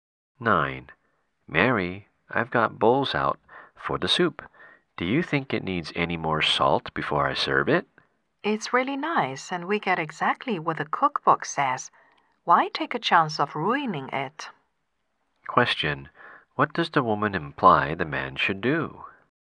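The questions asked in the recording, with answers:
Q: What does the woman imply the man should do?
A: Serve the soup without adding more salt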